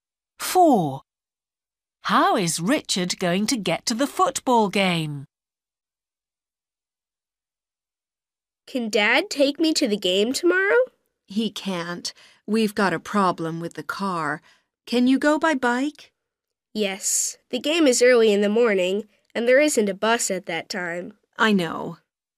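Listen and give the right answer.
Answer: by bike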